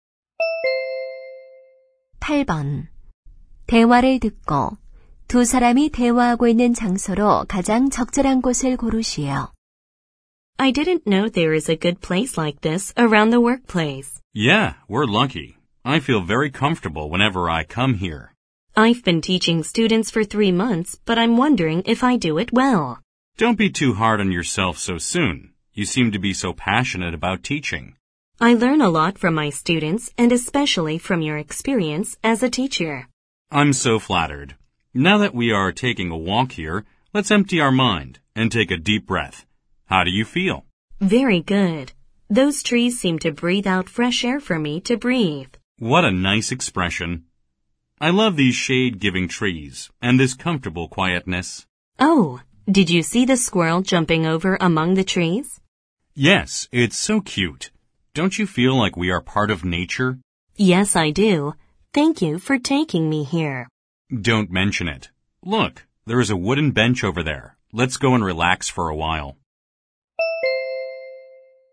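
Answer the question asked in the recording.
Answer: 직장 근처 공원(산책로)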